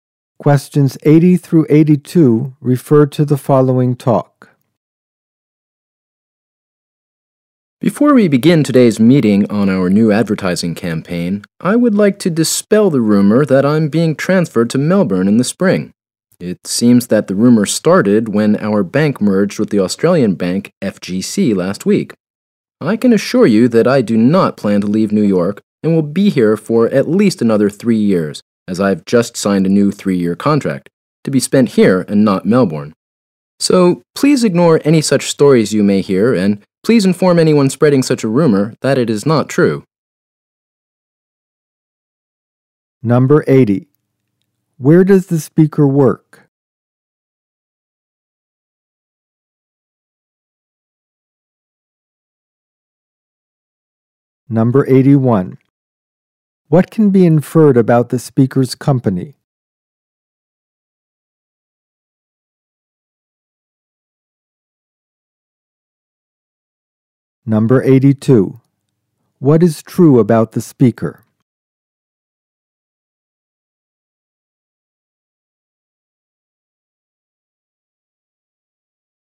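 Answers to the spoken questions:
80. At a bank
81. It recently merged with an Australian bank
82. They will stay in New York for at least three more years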